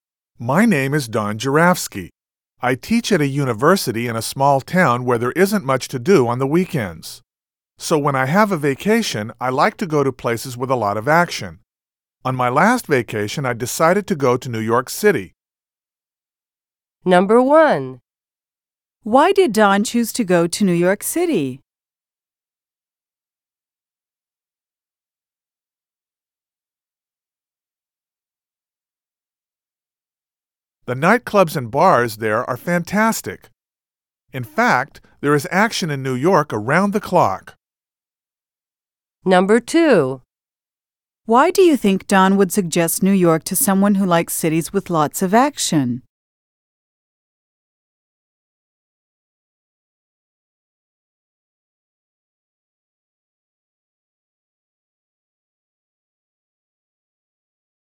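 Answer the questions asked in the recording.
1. He lives in a small town with little to do, and he likes places with a lot of action.
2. The nightclubs and bars are fantastic, and there is action around the clock.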